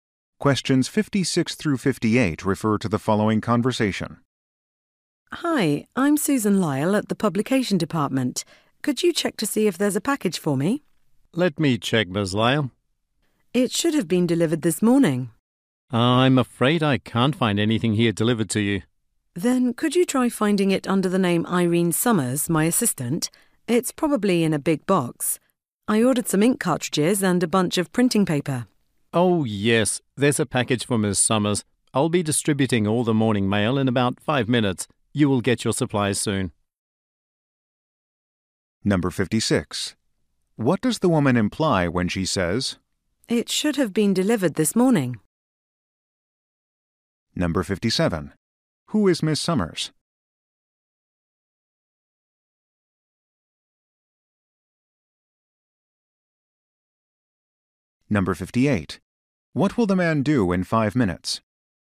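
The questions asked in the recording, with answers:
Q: What does the woman imply when she says,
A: Her package should already have arrived

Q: Who is Miss Summers?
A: Susan Lyle's assistant

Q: What will the man do in 5 minutes?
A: Distribute the morning mail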